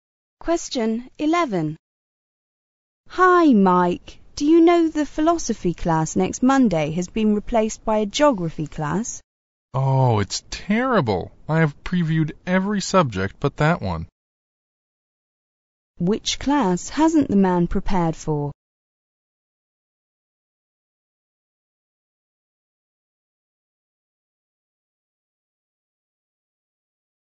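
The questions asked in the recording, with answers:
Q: Which class hasn't the man prepared for?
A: The geography class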